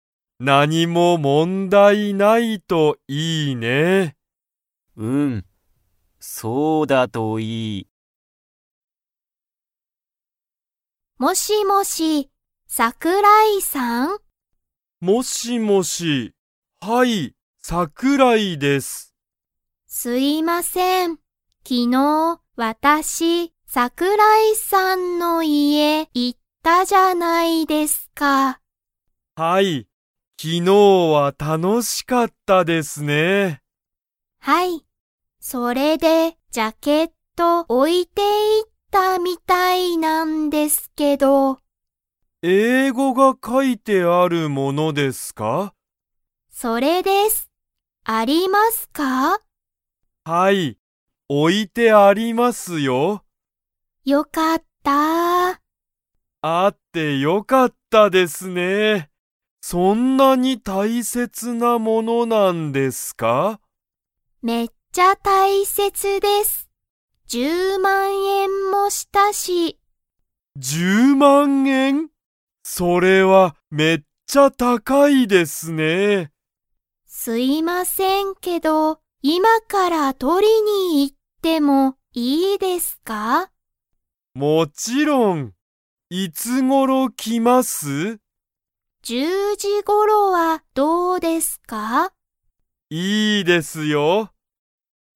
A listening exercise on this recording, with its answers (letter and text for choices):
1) 岩田(いわた)さんは、昨日(きのう)、桜井(さくらい)さんの家(いえ)に行(い)きましたか?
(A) はい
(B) いいえ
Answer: (A) はい

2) 岩田(いわた)さんのジャケットは、____ものだ。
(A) 楽(たの)しい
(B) 大切(たいせつ)な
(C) 安(やす)い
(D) 簡単(かんたん)な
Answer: (B) 大切(たいせつ)な

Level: Level 2